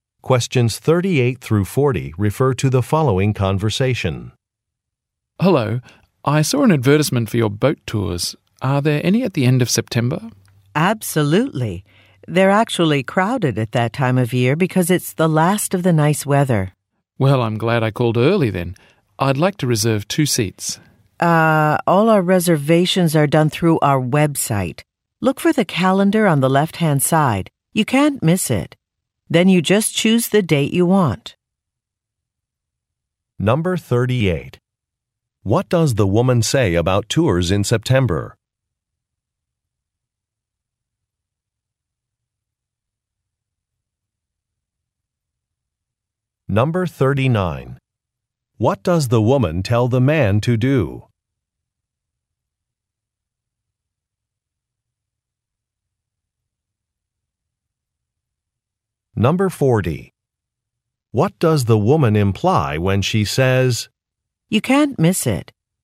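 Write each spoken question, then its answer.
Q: What does the woman say about tours in September?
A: They are crowded then because it's the last of the nice weather.

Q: What does the woman tell the man to do?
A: Make a reservation on the website.

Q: What does the woman imply when she says, "You can't miss it.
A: The calendar on the website is easy to find.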